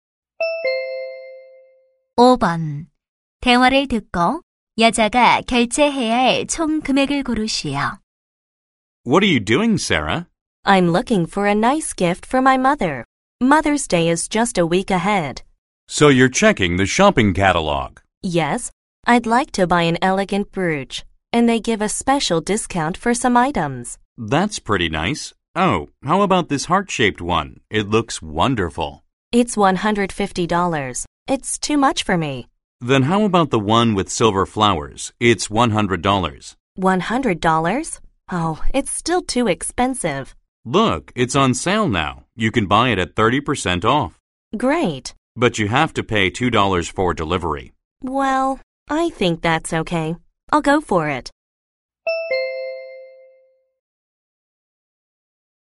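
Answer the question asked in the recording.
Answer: 72달러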